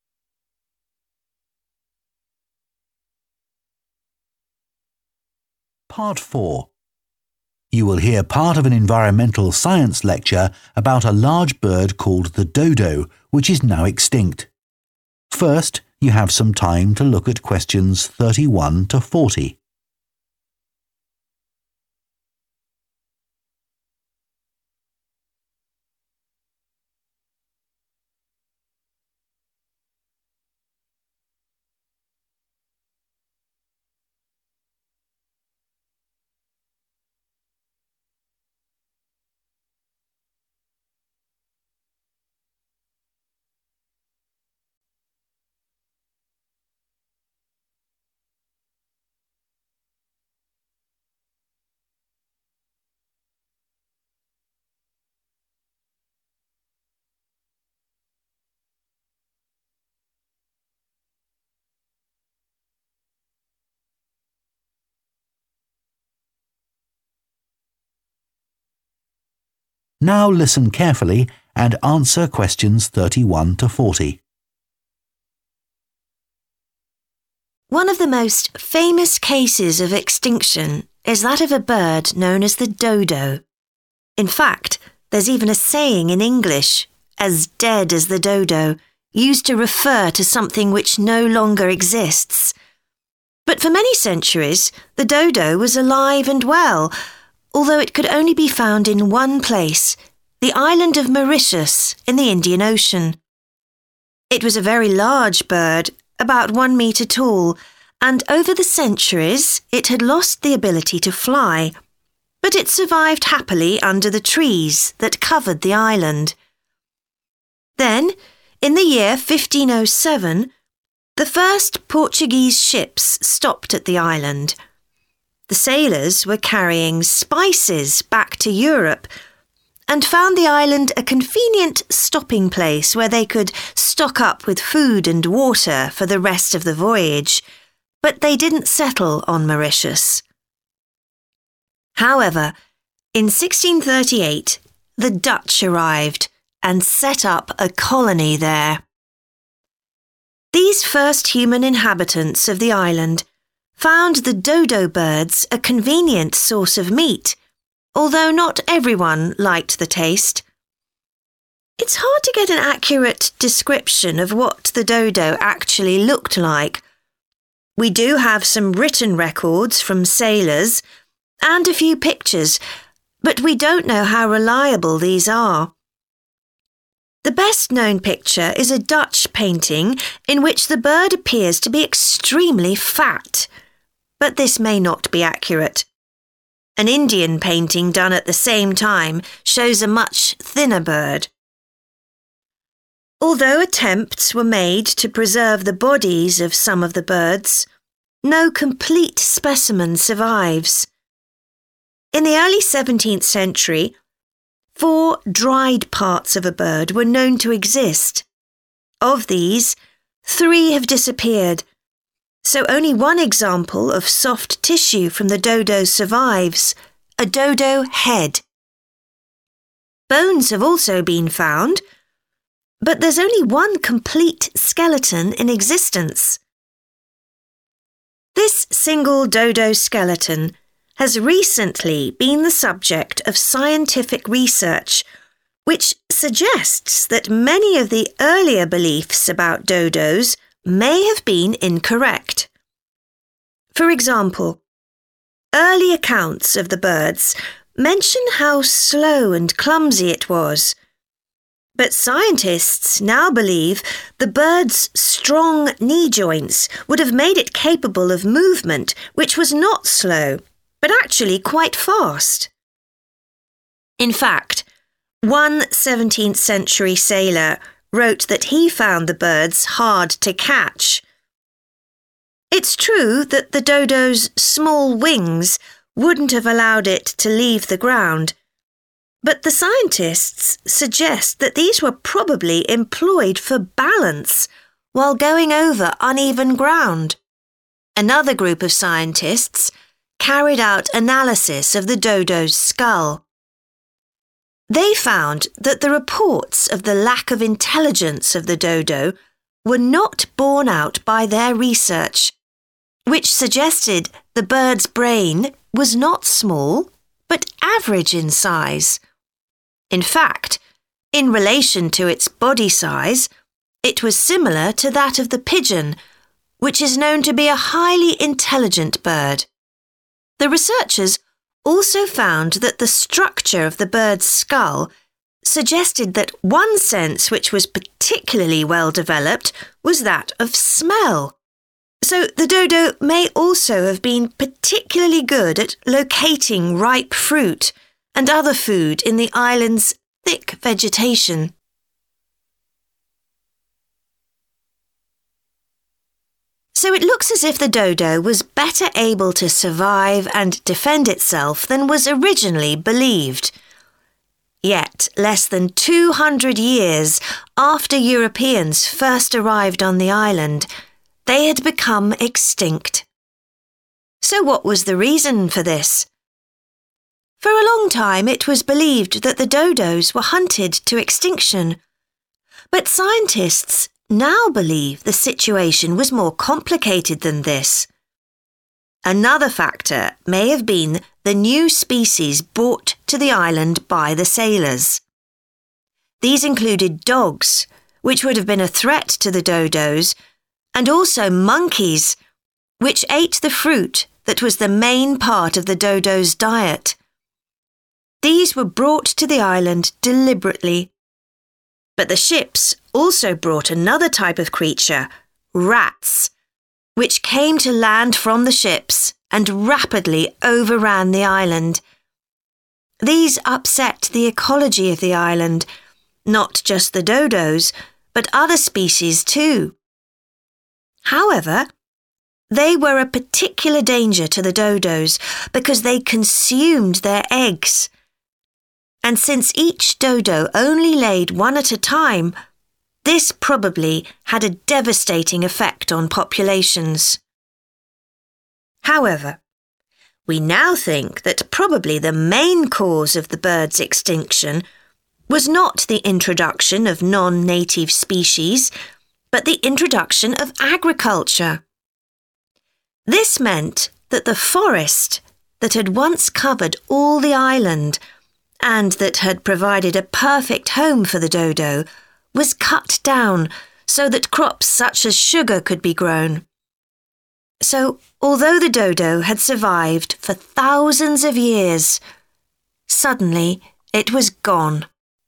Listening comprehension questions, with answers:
Complete the notes below. Write ONE WORD ONLY for each answer.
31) – 1507 – Portuguese ships transporting 31. stopped at the island to collect food and water.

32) – 1638 – The Dutch established a 32. on the island.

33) – A Dutch painting suggests the dodo was very 33.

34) – The only remaining soft tissue is a dried 34.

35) – Recent studies of a dodo skeleton suggest the birds were capable of rapid 35.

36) – It's thought they were able to use their small wings to maintain 36.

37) – Their 37. was of average size.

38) – Their sense of 38. enabled them to find food.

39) – 39. also escaped onto the island and ate the birds' eggs.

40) – The arrival of farming meant the 40. was destroyed.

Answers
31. spice(s)
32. colony / settlement
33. fat
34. head
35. movement
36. balance / balancing
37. brain
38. smell
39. rats
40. forest